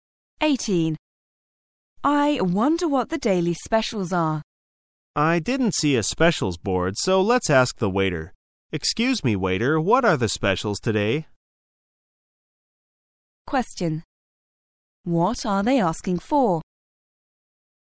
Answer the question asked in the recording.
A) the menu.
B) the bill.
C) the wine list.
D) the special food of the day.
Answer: D) the special food of the day.

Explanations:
此题考查听细节的能力。解题关键在于听懂关键词"the daily special"与"the special food of the day"意思相同,表示"每天的特色菜"。

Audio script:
[解析] W: I wonder what the daily specials are. M: I didn't see a specials board, so let's ask the waiter. Excuse me, waiter, what are the specials today? Q: What are they asking for?